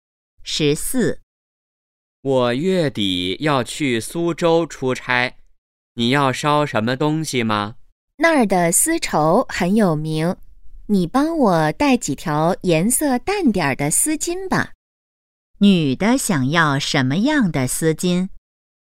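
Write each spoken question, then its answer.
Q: 女的想要什么样的丝巾?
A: 颜色淡点的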